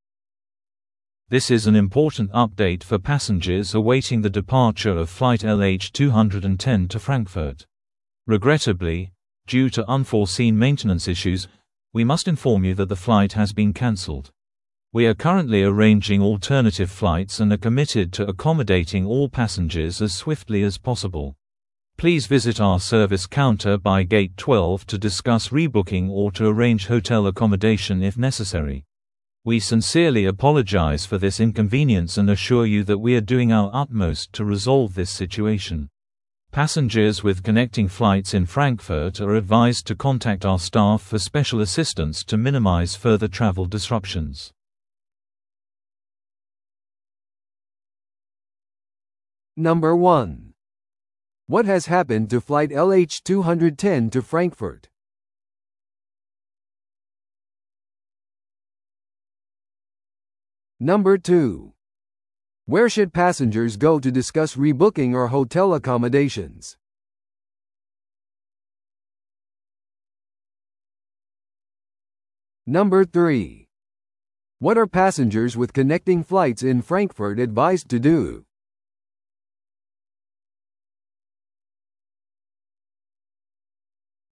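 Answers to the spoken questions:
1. It has been cancelled due to maintenance issues.
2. The service counter by gate 12.
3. Contact the staff for special assistance.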